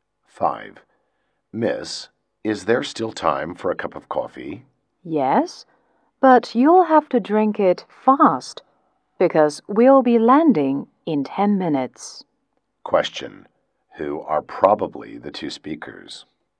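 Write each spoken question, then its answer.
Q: Who are probably the two speakers?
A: A flight attendant and a passenger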